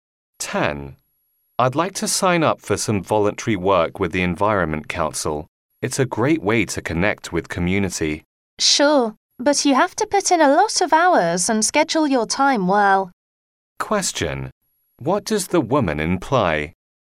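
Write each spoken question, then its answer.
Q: What does the woman imply?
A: Voluntary work takes a lot of time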